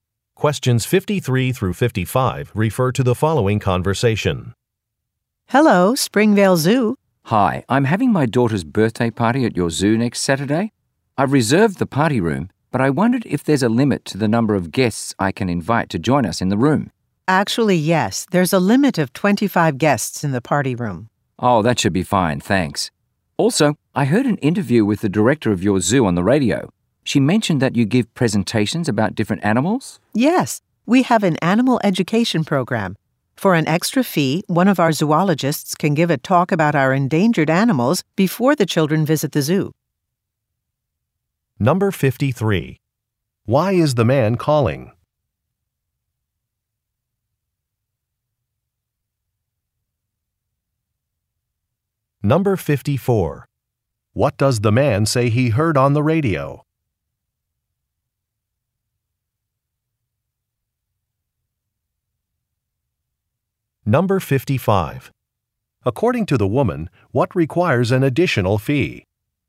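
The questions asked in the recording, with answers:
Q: Why is the man calling?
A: To ask about the guest limit for the party room

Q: What does the man say he heard on the radio?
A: An interview with the zoo director

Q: According to the woman, what requires an additional fee?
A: A zoologist's talk about endangered animals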